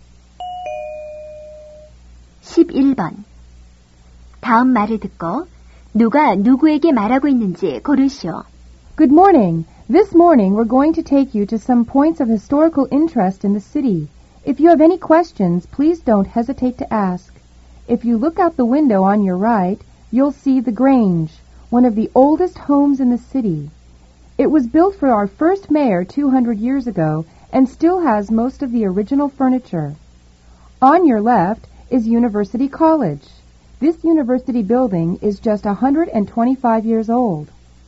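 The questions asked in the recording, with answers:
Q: 다음 말을 듣고 누가 누구에게 말하고 있는지 고르시오.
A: 관광 가이드가 관광객에게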